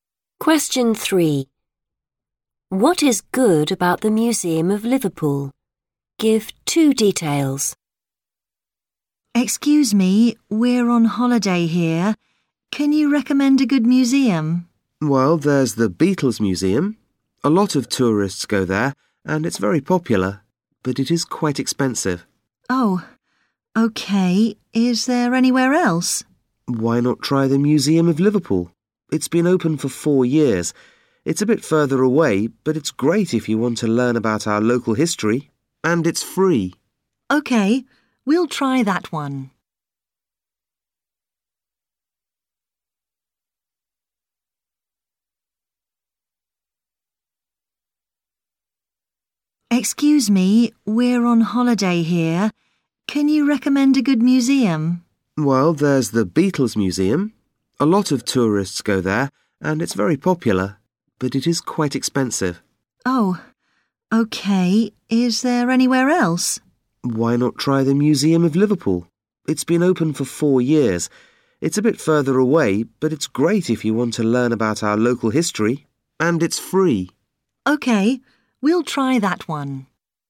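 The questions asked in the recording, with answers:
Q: What is good about the Museum of Liverpool?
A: You can learn about local history, and it's free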